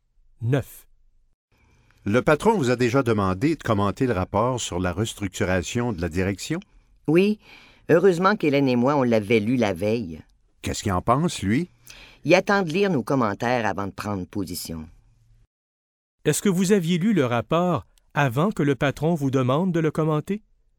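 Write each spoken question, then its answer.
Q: Est-ce que vous aviez lu le rapport avant que le patron vous demande de le commenter?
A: Oui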